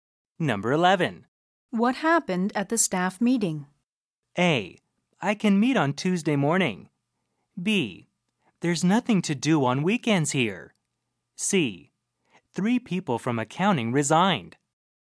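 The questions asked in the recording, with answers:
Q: What happened at the staff meeting?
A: C: 3 people from accounting resigned.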